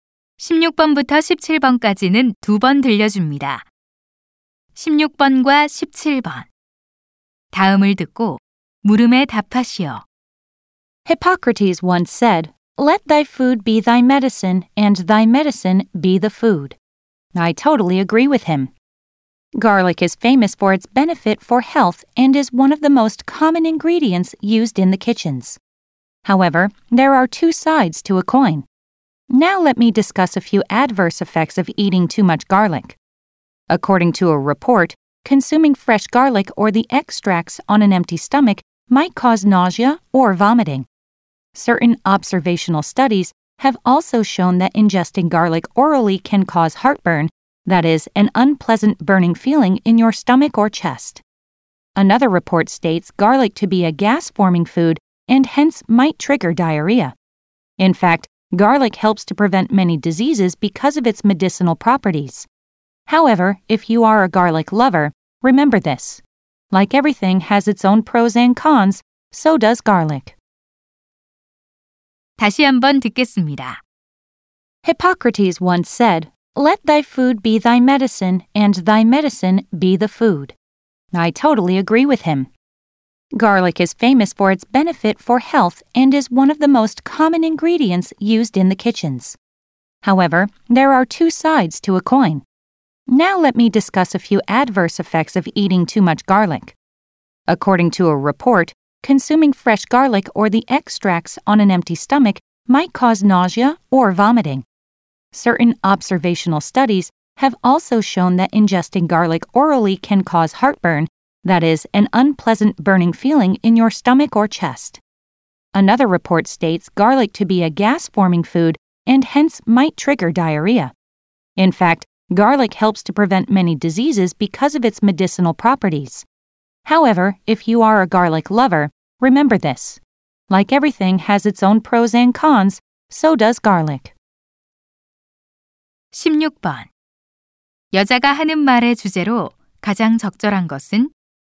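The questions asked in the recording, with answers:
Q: 여자가 하는 말의 주제로 가장 적절한 것은?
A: 마늘을 과다 섭취할 때의 부작용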